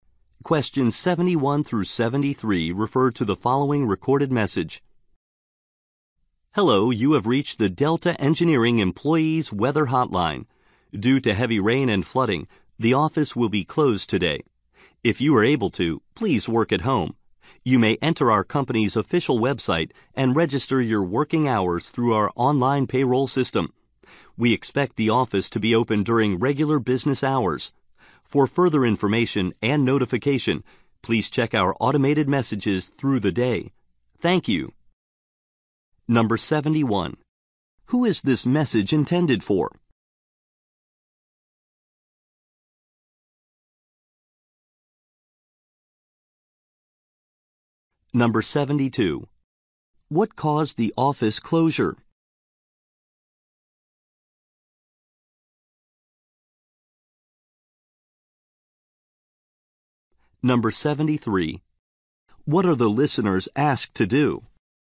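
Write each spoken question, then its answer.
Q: Who is this message intended for?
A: Delta Engineering employees

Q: What caused the office closure?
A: Heavy rain and flooding

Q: What are the listeners asked to do?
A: Work at home and register working hours online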